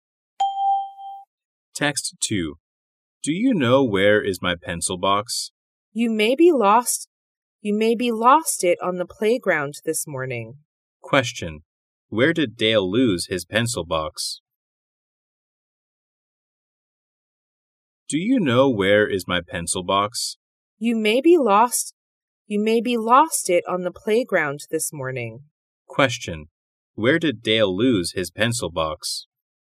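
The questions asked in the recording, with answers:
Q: Where did Dale lose his pencil box?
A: On the playground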